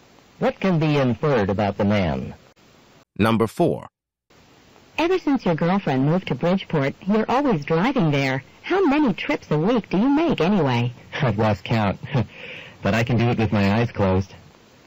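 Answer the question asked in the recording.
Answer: He makes the trip so often that he knows the route very well.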